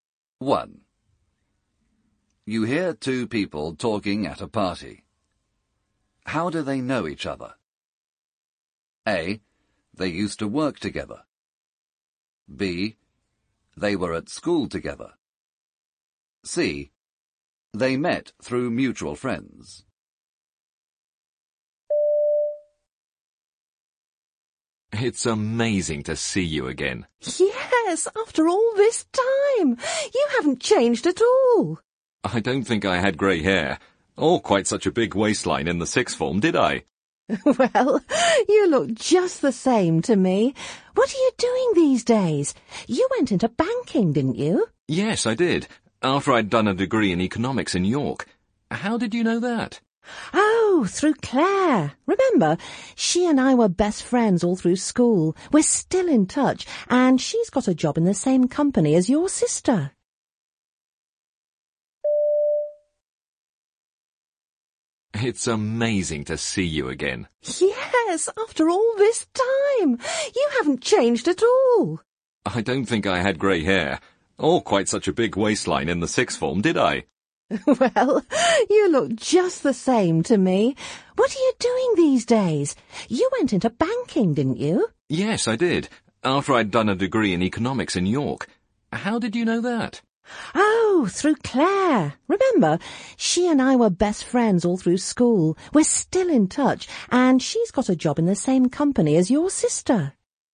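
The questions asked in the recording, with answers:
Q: How do they know each other?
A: B: They were at school together.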